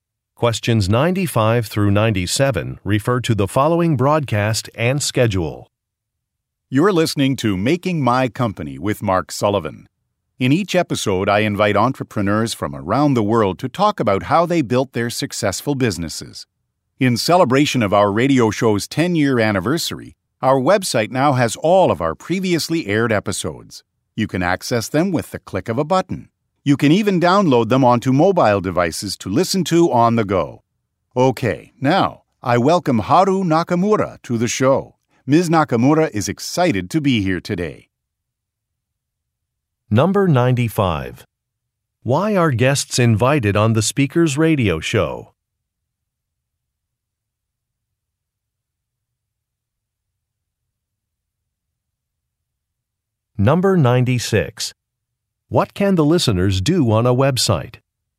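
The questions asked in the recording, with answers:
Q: Why are guests invited on the speaker's radio show?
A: To talk about how they built their successful businesses

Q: What can the listeners do on a website?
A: Access and download previous episodes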